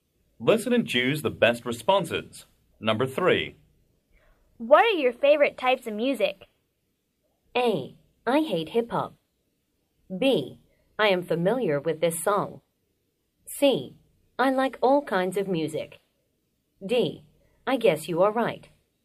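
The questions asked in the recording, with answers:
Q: What are your favorite types of music?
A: C: I like all kinds of music.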